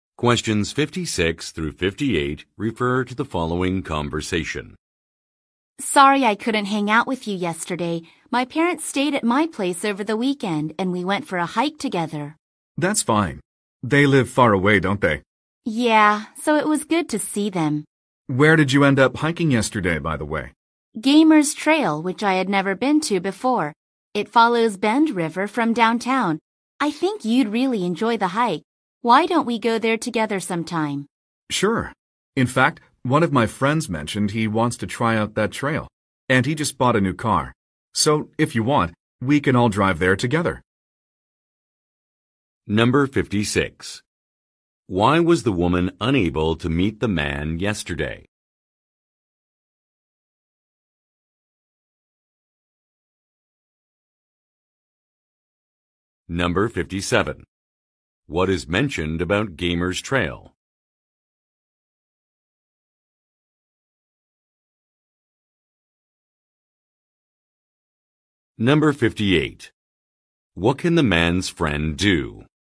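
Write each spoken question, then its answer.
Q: Why was the woman unable to meet the man yesterday?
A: Her parents were visiting and she went hiking with them.

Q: What is mentioned about Gamer's Trail?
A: It follows Bend River from downtown.

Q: What can the man's friend do?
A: Drive them to the trail in his new car.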